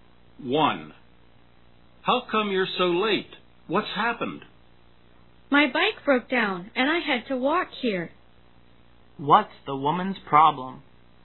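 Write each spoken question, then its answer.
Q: What's the woman's problem?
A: Her bike broke down and she had to walk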